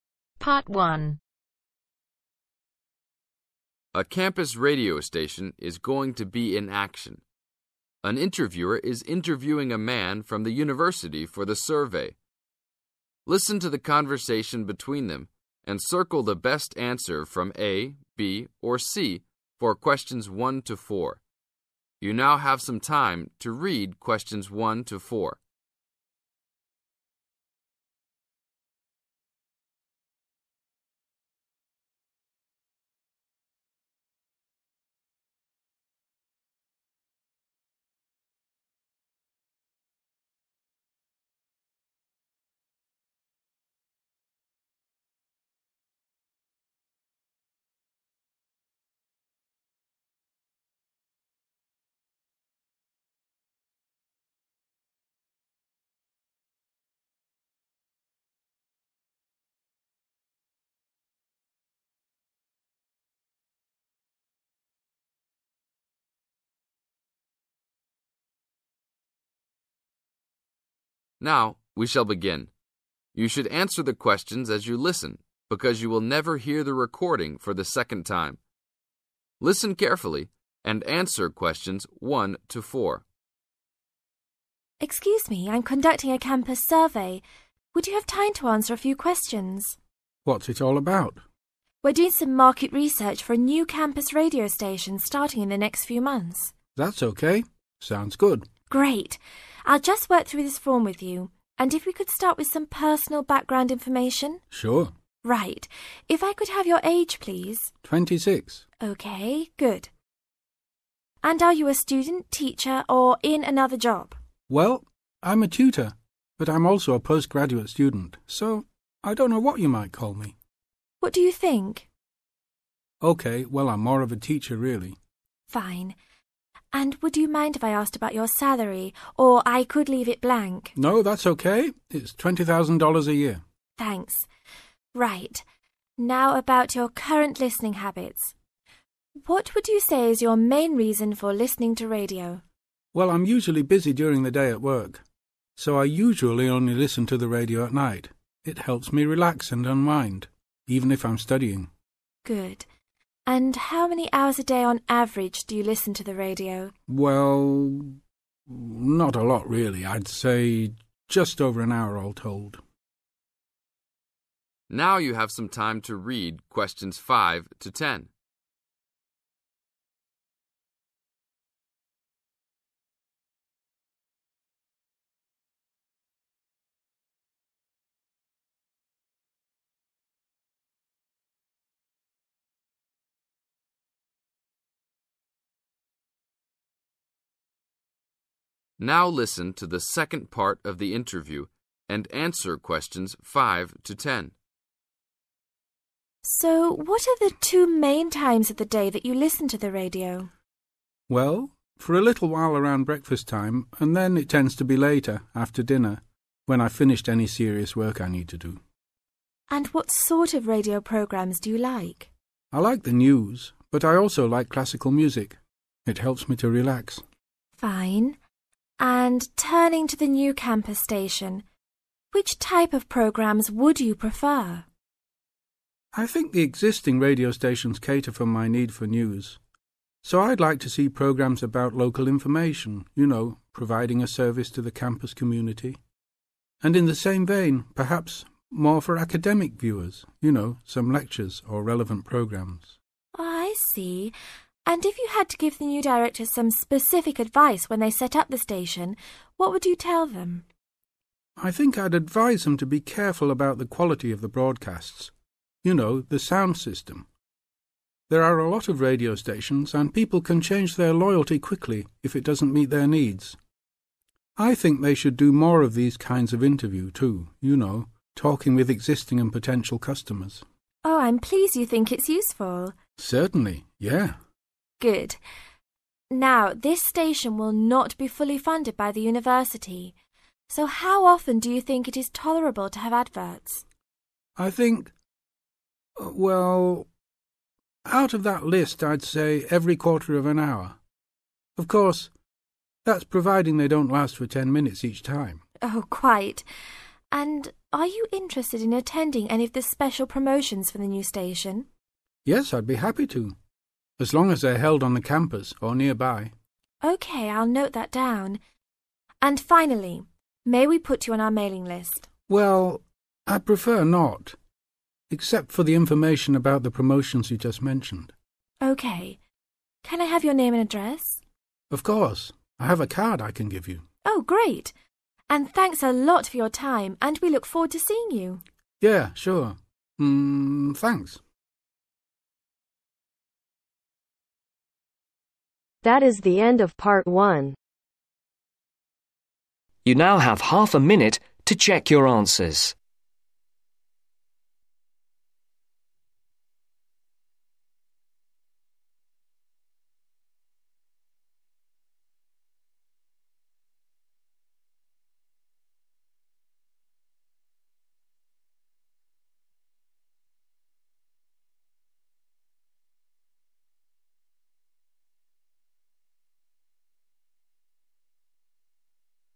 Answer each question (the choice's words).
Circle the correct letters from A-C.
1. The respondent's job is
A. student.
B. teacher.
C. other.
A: teacher.

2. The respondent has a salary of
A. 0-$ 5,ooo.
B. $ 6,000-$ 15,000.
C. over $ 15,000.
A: over $ 15,000.

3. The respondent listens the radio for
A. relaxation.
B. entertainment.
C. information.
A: relaxation.

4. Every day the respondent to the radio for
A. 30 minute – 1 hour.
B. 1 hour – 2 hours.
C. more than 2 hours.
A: 1 hour – 2 hours.

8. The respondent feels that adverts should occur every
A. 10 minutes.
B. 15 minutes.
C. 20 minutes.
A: 15 minutes.

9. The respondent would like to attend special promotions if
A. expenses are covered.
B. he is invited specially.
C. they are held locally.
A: they are held locally.

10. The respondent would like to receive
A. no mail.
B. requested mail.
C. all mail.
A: requested mail.